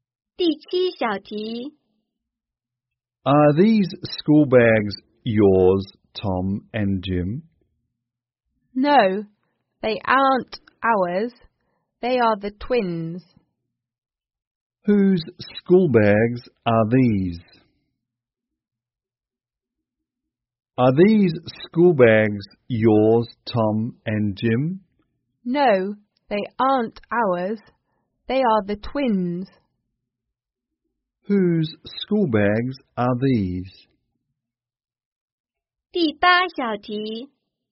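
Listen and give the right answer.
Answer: The twins'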